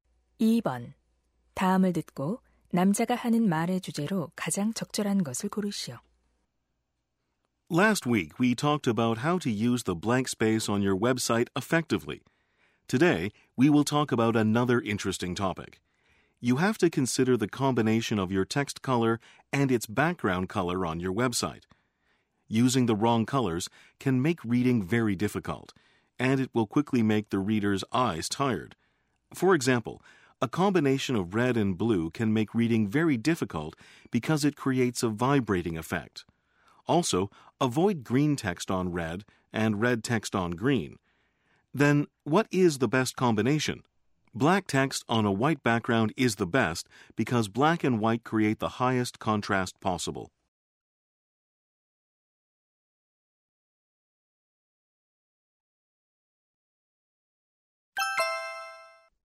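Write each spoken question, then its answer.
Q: 다음을 듣고 남자가 하는 말의 주제로 가장 적절한 것을 고르시오.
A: 웹사이트의 글자색과 배경색의 적절한 조합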